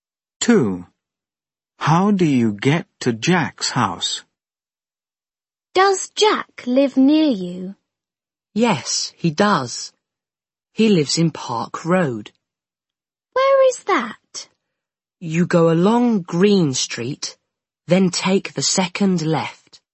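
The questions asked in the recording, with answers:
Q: How do you get to Jack's house?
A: Go along Green Street, then take the second left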